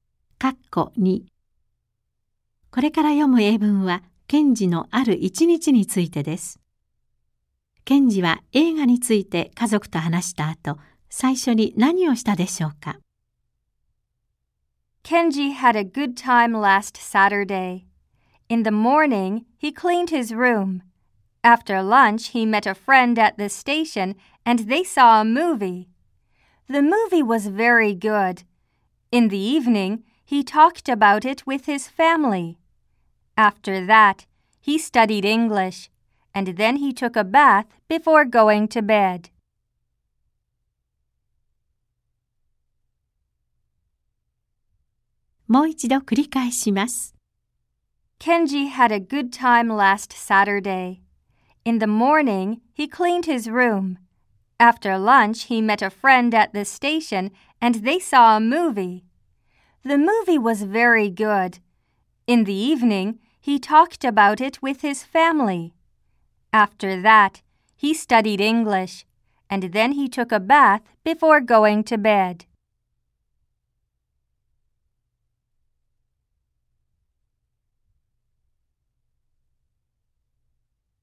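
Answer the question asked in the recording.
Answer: 英語を勉強した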